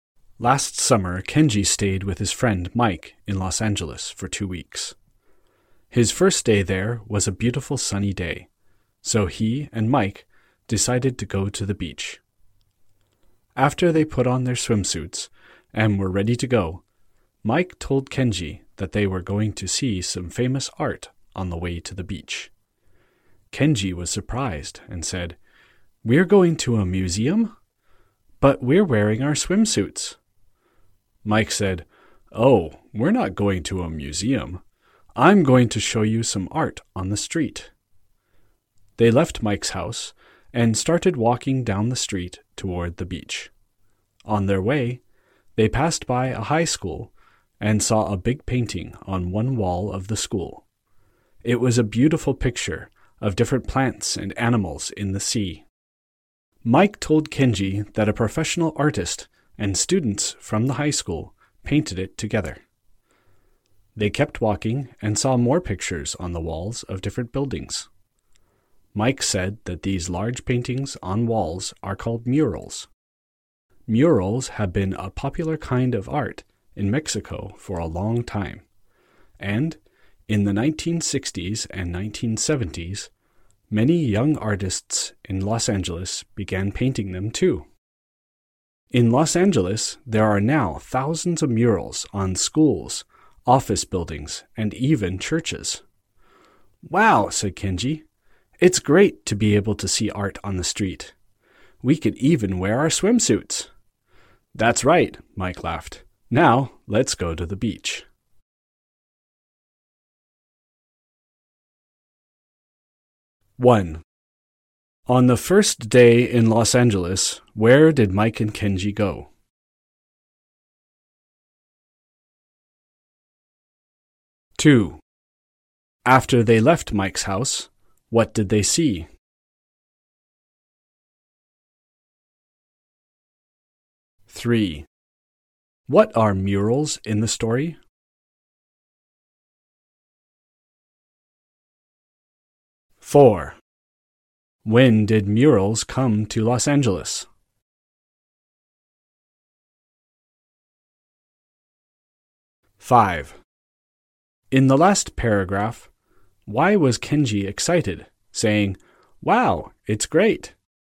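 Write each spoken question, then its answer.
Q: On the first day in Los Angeles, where did Mike and Kenji go?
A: To the beach (seeing murals on the way)

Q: After they left Mike's house, what did they see?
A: A big painting (mural) on a wall of a high school

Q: What are murals in the story?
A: Large paintings on walls

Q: When did murals come to Los Angeles?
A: In the 1960s and 1970s

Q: In the last paragraph, why was Kenji excited, saying, "Wow, it's great"?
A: Because he could see art on the street, even wearing swimsuits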